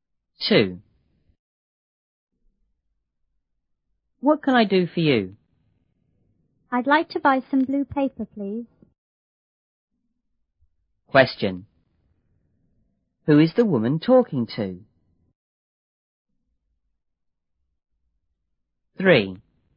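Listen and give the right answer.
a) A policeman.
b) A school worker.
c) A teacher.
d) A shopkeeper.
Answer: d) A shopkeeper.

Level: 初中英语广州版1B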